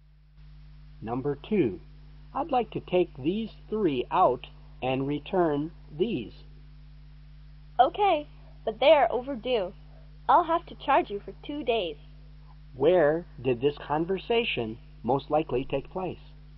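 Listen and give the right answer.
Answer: In a library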